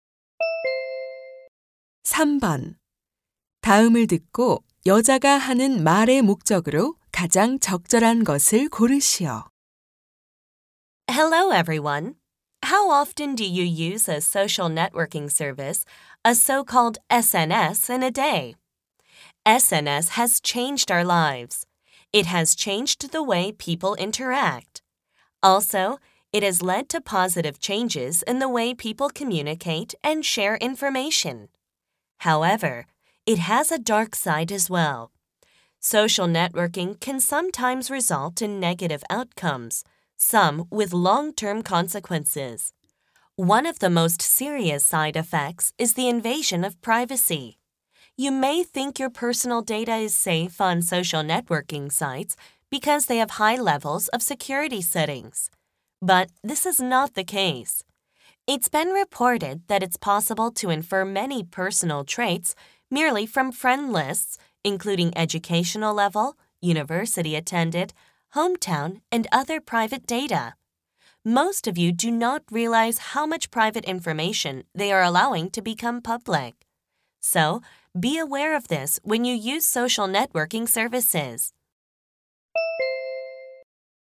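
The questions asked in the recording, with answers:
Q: 다음을 듣고 여자가 하는 말의 목적으로 가장 적절한 것을 고르시오.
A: SNS 사용 시 개인정보 노출 위험을 경고하려고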